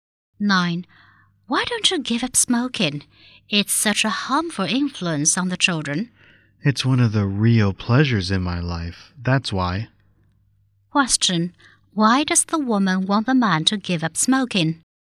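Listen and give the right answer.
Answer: It is harmful to the children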